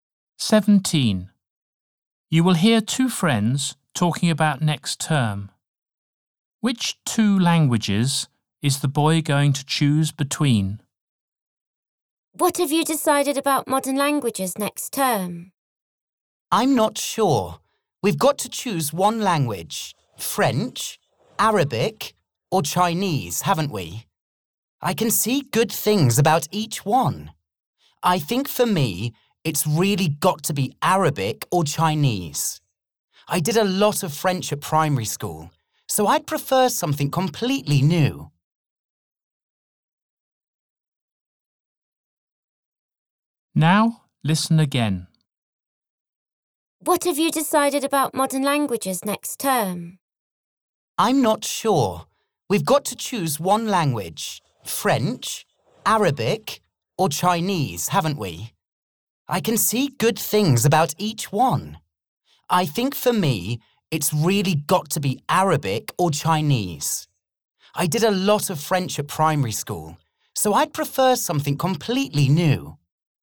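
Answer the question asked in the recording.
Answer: Arabic and Chinese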